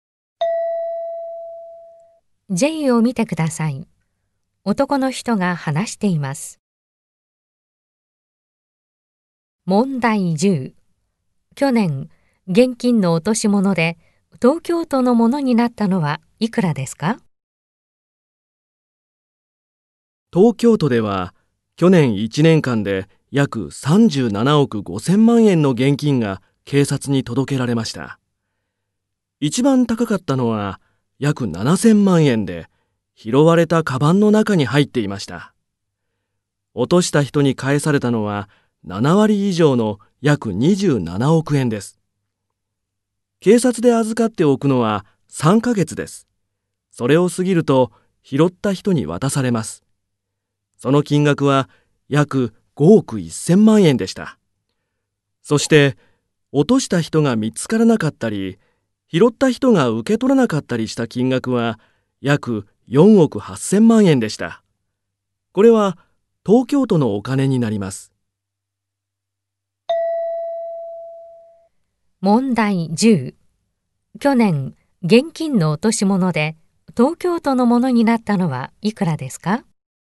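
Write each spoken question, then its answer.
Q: 去年、現金の落とし物で東京都のものになったのはいくらですか?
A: 約4億8000万円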